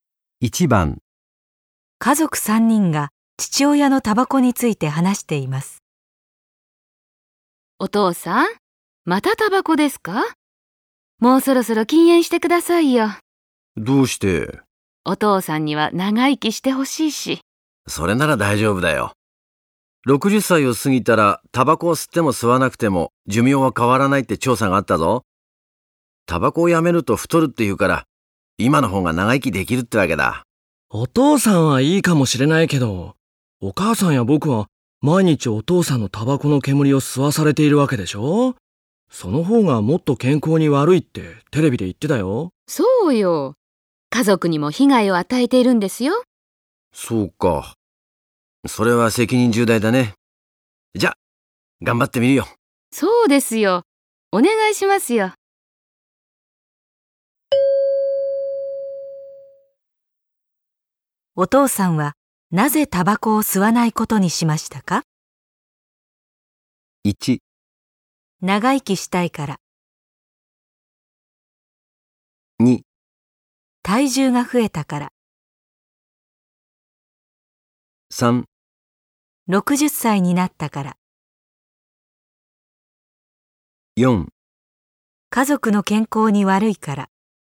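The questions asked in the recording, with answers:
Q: お父さんはなぜタバコを吸わないことにしましたか?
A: 4: 家族の健康に悪いから。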